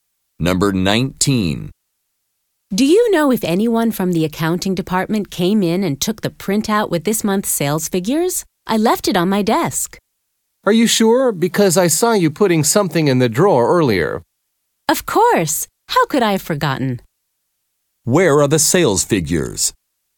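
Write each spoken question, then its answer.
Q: Where are the sales figures?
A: In the drawer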